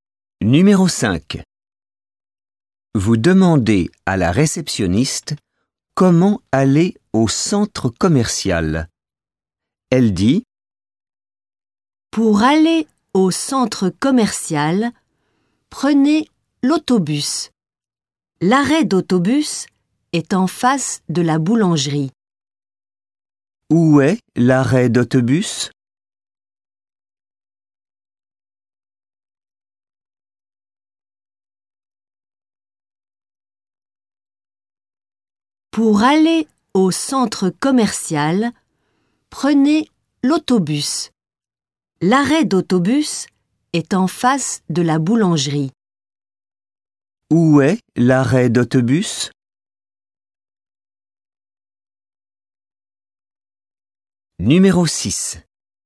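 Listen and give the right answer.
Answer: En face de la boulangerie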